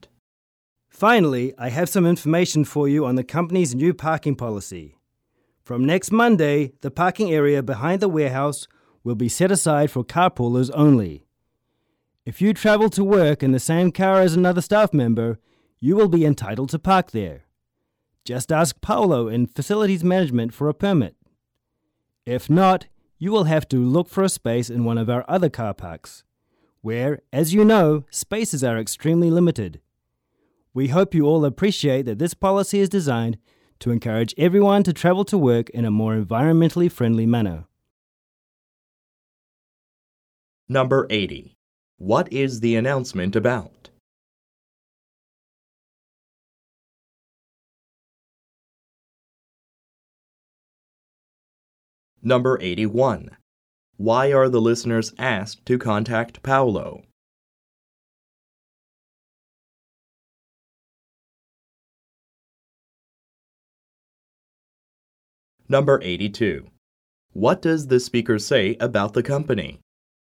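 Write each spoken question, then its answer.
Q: What is the announcement about?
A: The company's new parking policy

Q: Why are the listeners asked to contact Paolo?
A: To get a parking permit for carpoolers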